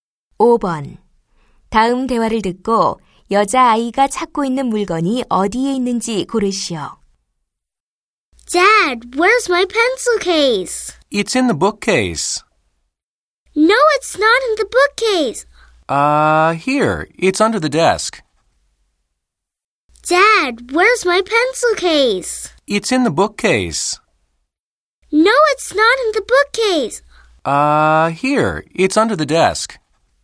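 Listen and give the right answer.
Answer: 책상 아래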